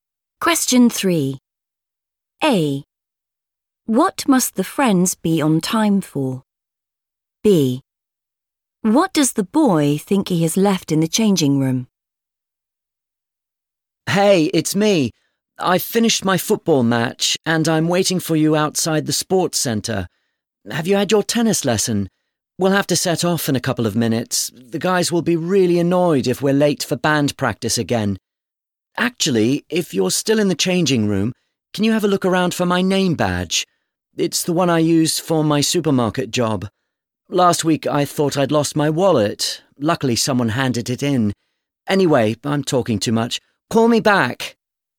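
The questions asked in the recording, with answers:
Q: What must the friends be on time for?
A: band practice

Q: What does the boy think he has left in the changing room?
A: name badge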